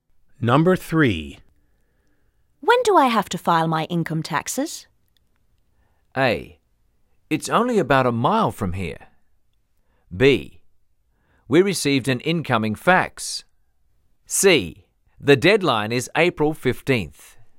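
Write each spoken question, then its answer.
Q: When do I have to file my income taxes?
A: C: The deadline is April 15th.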